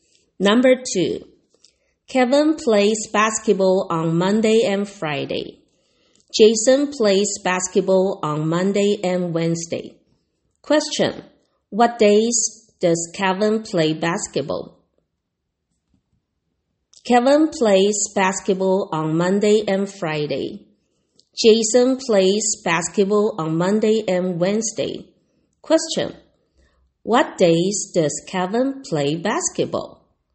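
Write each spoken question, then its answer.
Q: what days does Kevin play basketball?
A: Monday and Friday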